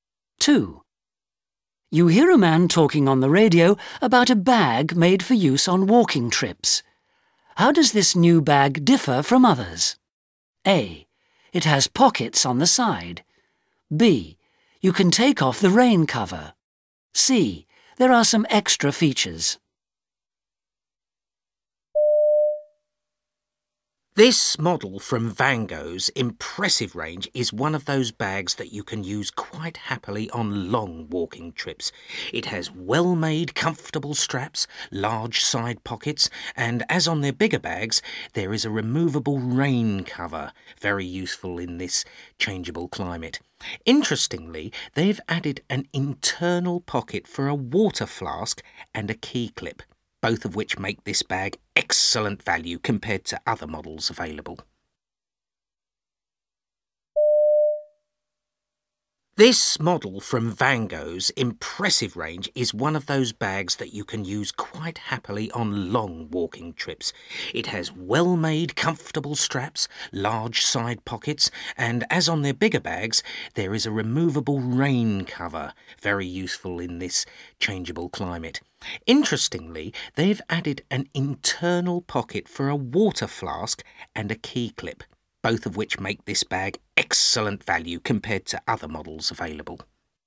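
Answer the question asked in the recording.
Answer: C: There are some extra features.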